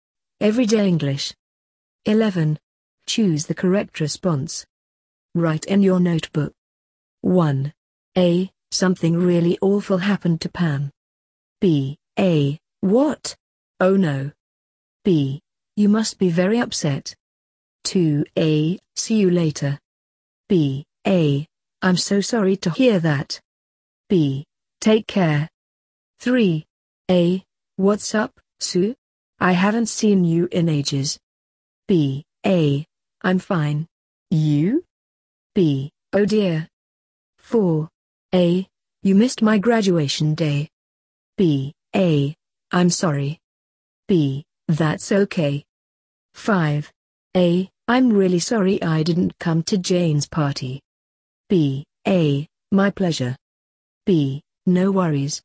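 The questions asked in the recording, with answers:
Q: A. See you later.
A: B: Take care.

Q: A. What's up, Sue?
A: A: I'm fine. You?

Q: A. You missed my graduation day.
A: A: I'm sorry.

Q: A. I'm really sorry I didn't come to Jane's party.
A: B: No worries.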